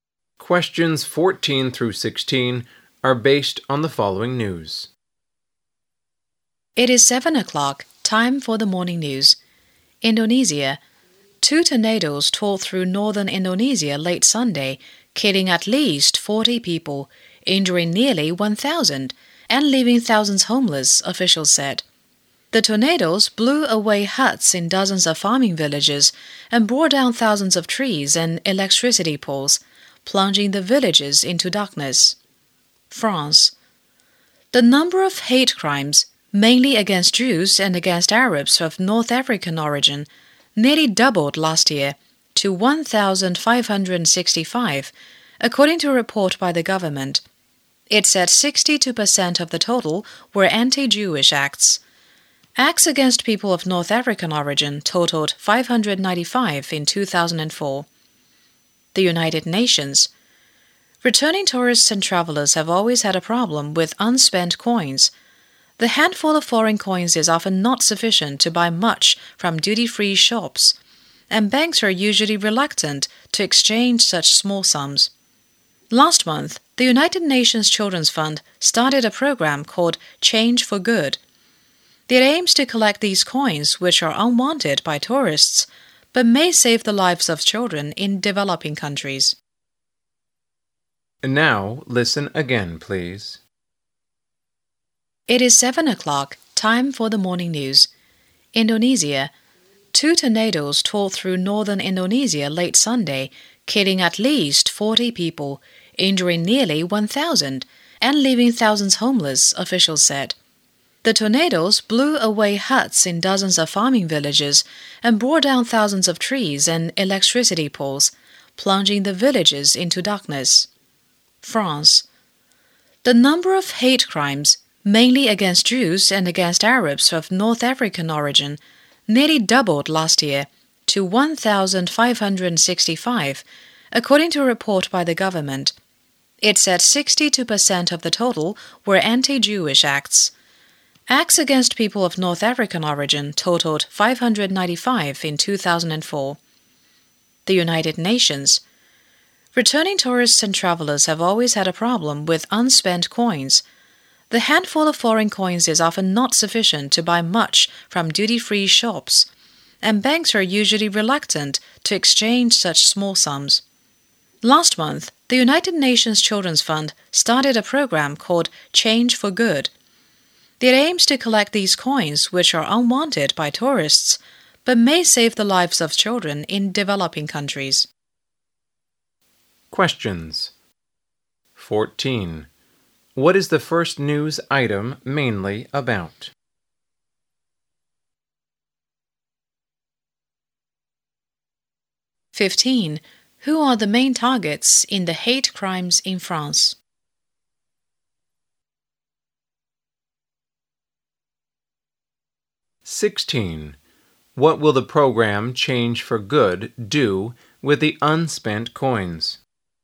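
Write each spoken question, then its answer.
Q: What is the first news item mainly about?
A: Tornadoes in northern Indonesia

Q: Who are the main targets in the hate crimes in France?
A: Jews and Arabs of North African origin

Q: What will the program Change for Good do with the unspent coins?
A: Collect them to help save the lives of children in developing countries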